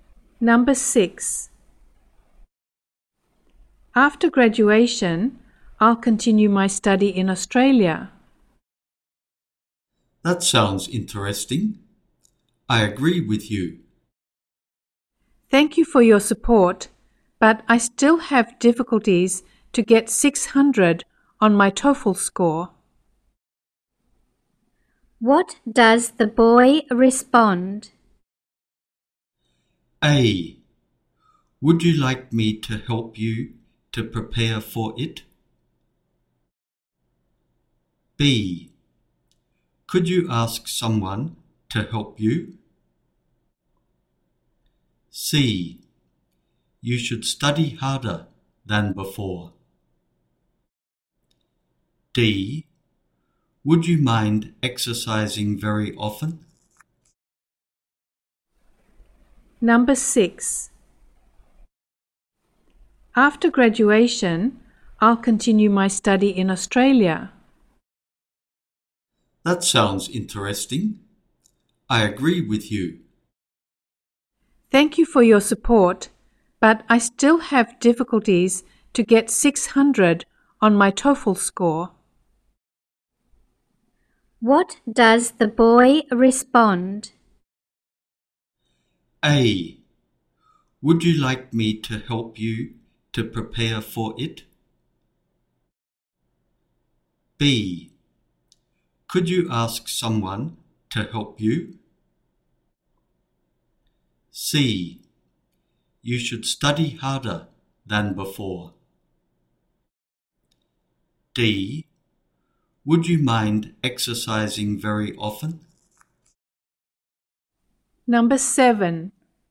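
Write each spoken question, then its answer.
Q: What does the boy respond?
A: A: Would you like me to help you to prepare for it?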